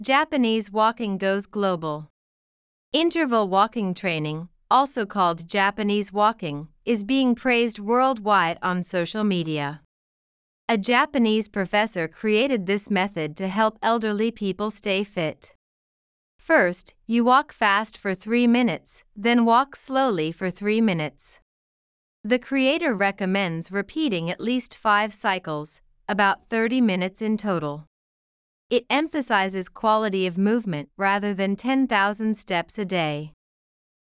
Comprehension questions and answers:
次の各英文の内容が本文の説明と合っていたら"True"、違っていたら"False" を選んでください。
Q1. A Japanese professor created Interval walking training to help himself stay fit.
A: False

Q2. In "Japanese Walking", it's not necessary to walk ten thousand steps a day.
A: True

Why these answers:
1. 2番目のセンテンスで、「高齢者の健康維持を助けるため」と説明されています。教授自身の健康のためではないため、設問1の解答は False となります。
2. 最後のセンテンスで、「1日1万歩という歩数よりも、動きの質を重視している」と述べられています。「必ずしも1日1万歩を歩く必要はない」と言えるので、設問2の解答は True となります。

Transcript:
Japanese Walking Goes Global
Interval walking training, also called "Japanese Walking", is being praised worldwide on social media.
A Japanese professor created this method to help elderly people stay fit.
First, you walk fast for three minutes, then walk slowly for three minutes.
The creator recommends repeating at least five cycles, about thirty minutes in total.
It emphasizes quality of movement rather than ten thousand steps a day.